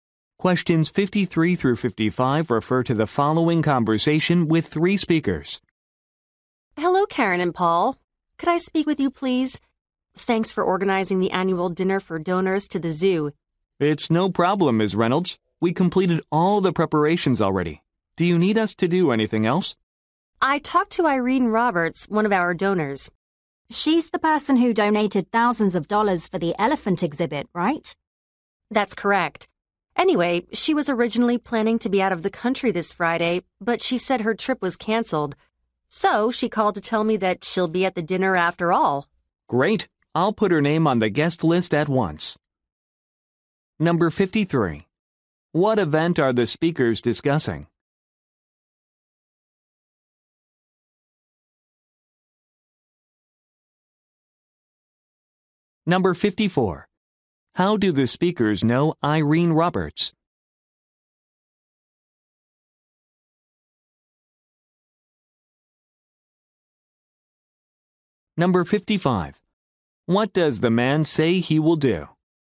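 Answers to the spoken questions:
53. The annual dinner for zoo donors
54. She is a donor to the zoo
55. Put her name on the guest list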